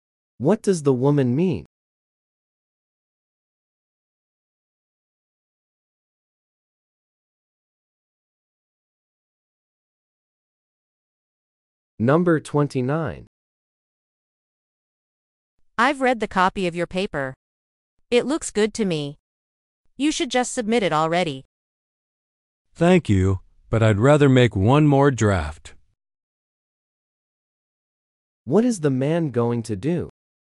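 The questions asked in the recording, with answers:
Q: What is the man going to do?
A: Revise his paper one more time.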